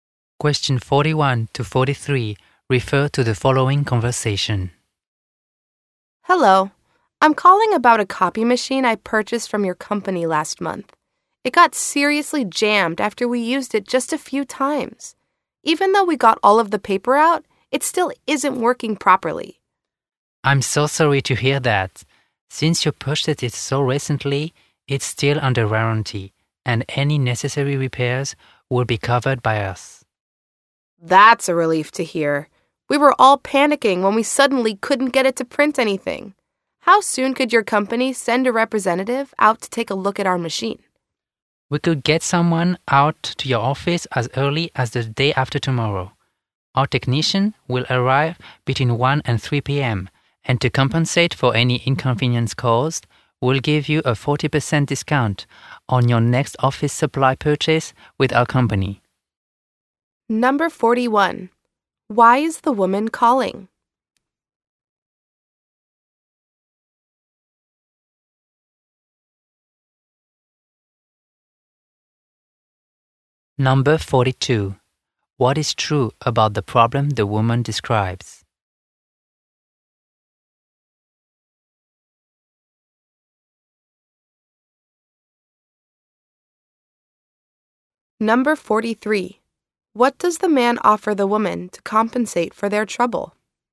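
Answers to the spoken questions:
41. Her new copy machine is jammed and not working
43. A 40% discount on her next office supply purchase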